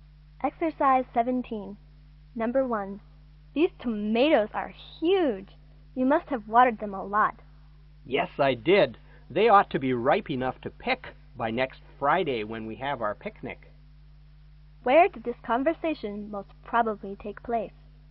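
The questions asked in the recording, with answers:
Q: Where did this conversation most probably take place?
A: In a garden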